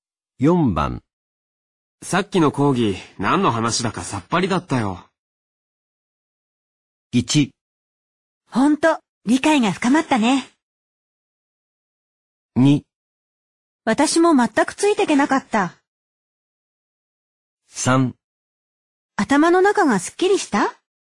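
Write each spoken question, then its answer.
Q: さっきの講義、何の話だかさっぱりだったよ。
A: 2: 私も全くついていけなかった。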